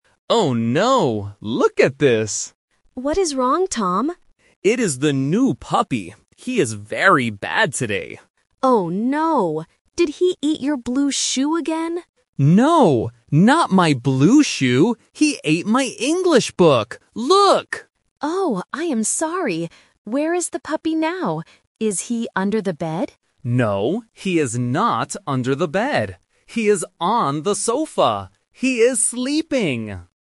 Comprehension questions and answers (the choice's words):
Listen to the conversation between a brother and a sister. Choose the correct answer (A, B, or C).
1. What did the puppy eat today?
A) A shoe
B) A book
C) A toy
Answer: A book

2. What color is the boy's shoe?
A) Black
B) Brown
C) Blue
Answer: Blue

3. Where is the puppy now?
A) Under the bed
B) On the sofa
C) In the garden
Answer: On the sofa

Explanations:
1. The boy says, "He ate my English book!" Option A (A shoe) is the trap because the girl asks, "Did he eat your blue shoe again?" but the boy says no. Option C (A toy) is not mentioned in the audio.
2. The girl asks about the "blue shoe" and the boy repeats "not my blue shoe." Option A (Black) and Option B (Brown) are plausible colors for shoes, but they are not mentioned.
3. The boy says, "He is on the sofa." Option A (Under the bed) is the trap because the girl asks about it first, but the boy says, "No, he is not under the bed." Option C (In the garden) is not mentioned.

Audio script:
Boy: Oh no! Look at this!
Girl: What is wrong, Tom?
Boy: It is the new puppy. He is very bad today.
Girl: Oh no. Did he eat your blue shoe again?
Boy: No, not my blue shoe. He ate my English book! Look!
Girl: Oh, I am sorry. Where is the puppy now? Is he under the bed?
Boy: No, he is not under the bed. He is on the sofa. He is sleeping!

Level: A1